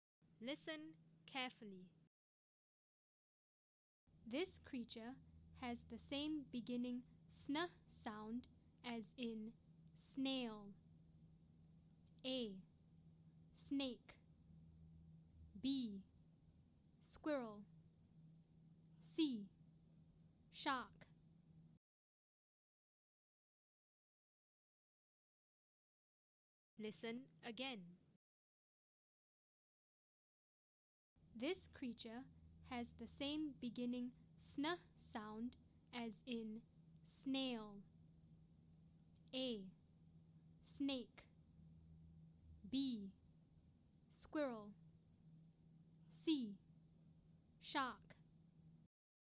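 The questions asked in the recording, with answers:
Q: This creature has the same beginning sn sound as in snail.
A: A: Snake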